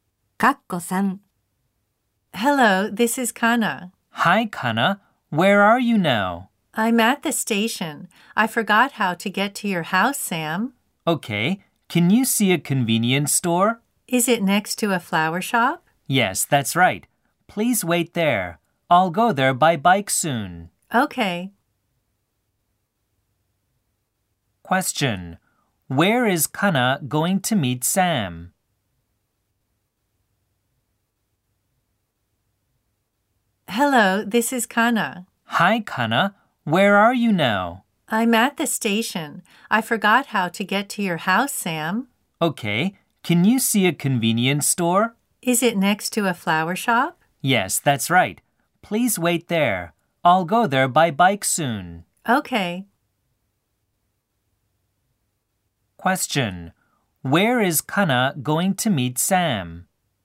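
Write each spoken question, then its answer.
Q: Question. Where is Kana going to meet Sam?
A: At the convenience store next to a flower shop.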